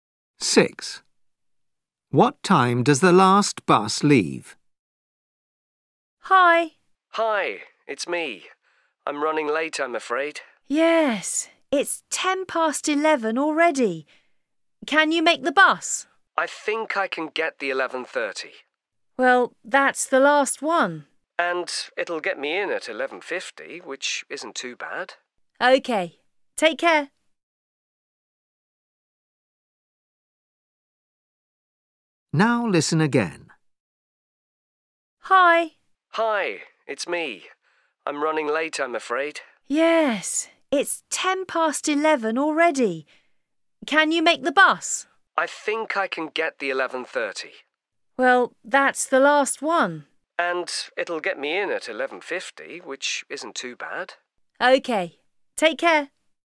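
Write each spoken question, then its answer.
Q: What time does the last bus leave?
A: 11:30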